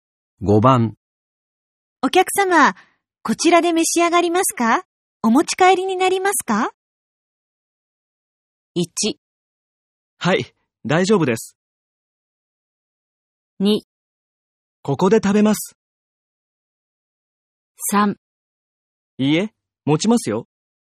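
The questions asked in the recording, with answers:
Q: お客様、こちらで召し上がりますか?お持ち帰りになりますか?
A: 2: ここで食べます。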